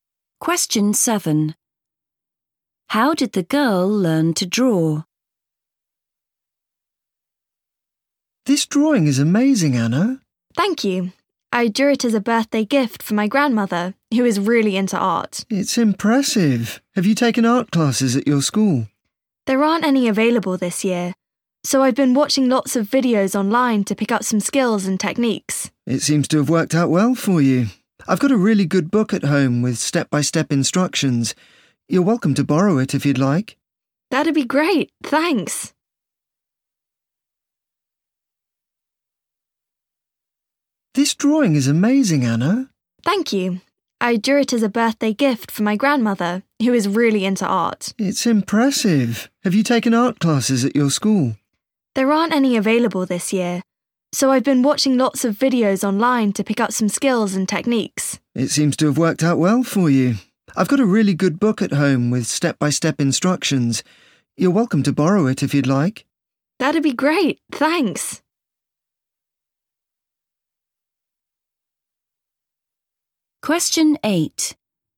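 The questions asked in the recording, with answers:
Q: How did the girl learn to draw?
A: By watching videos online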